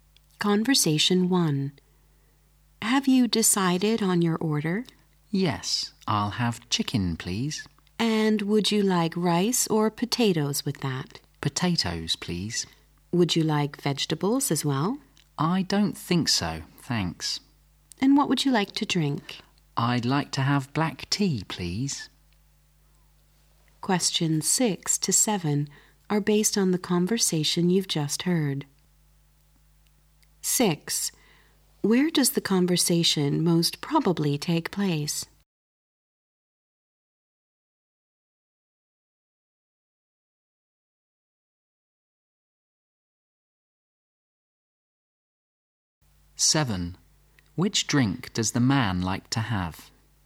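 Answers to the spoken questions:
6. In a restaurant
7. Black tea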